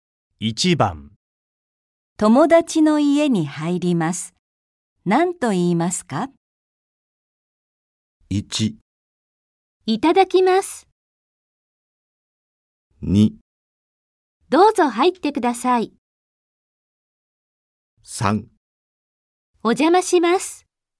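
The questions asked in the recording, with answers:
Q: 友達の家に入ります。何と言いますか?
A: 3: お邪魔します。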